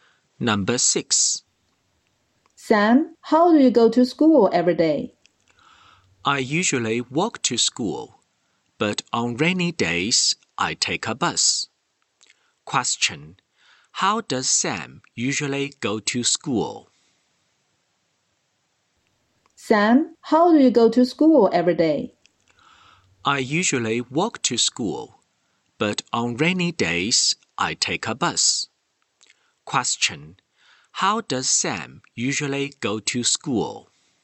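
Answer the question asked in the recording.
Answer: He walks to school.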